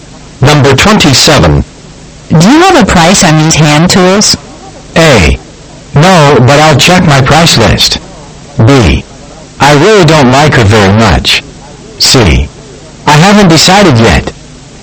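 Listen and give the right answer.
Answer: A: No, but I'll check my price list.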